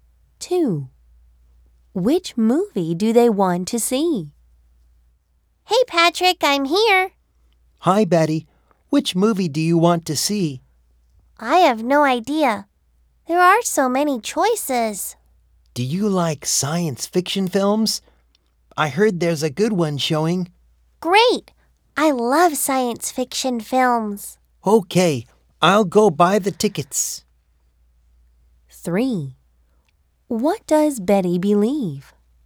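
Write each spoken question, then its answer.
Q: Which movie do they want to see?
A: A science fiction film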